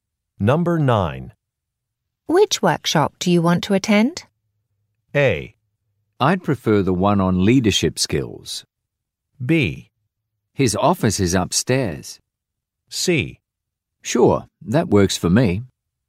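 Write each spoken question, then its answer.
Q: Which workshop do you want to attend?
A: A: I'd prefer the one on leadership skills.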